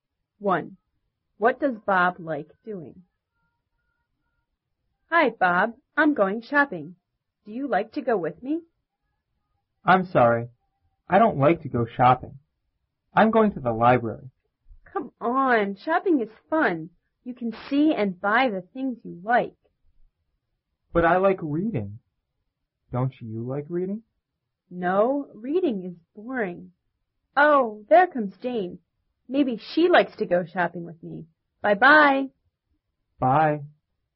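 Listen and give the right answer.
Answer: Reading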